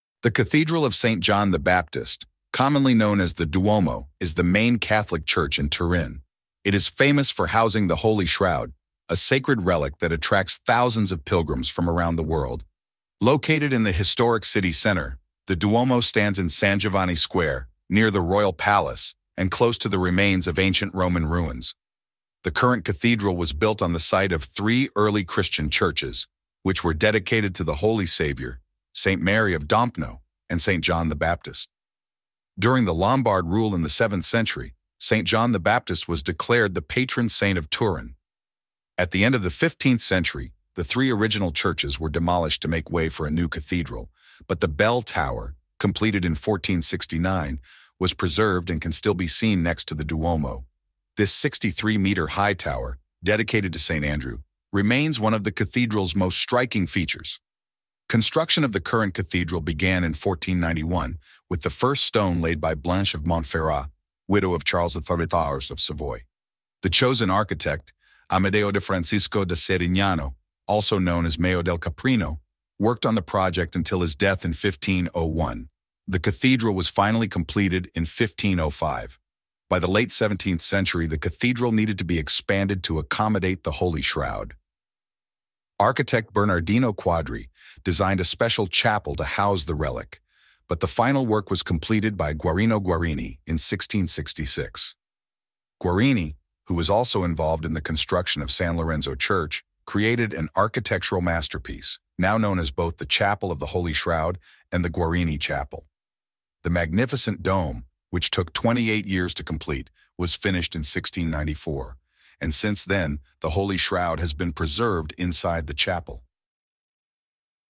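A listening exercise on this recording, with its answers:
Listen and complete the text with the missing words.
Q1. Located in the historic city center, the Duomo in San Giovanni Square, near the Royal Palace and close to the remains of ancient Roman ruins.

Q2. The current cathedral was built on the site of three Christian churches, which were dedicated to the Holy Savior, Saint Mary of Dompno, and Saint John the Baptist.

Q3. During the Lombard rule in the 7th century, Saint John the Baptist was the patron saint of Turin.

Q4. Construction of the current cathedral in 1491, with the first stone laid by Blanche of Montferrat, widow of Charles I of Savoy.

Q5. The chosen architect, Amedeo de Francisco da Settignano, also known as Meo del Caprino, worked on the project until his in 1501.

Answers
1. stands
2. early
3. declared
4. began
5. death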